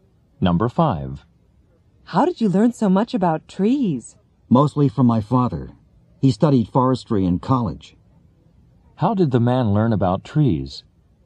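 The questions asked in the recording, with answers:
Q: How did the man learn about trees?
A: Mostly from his father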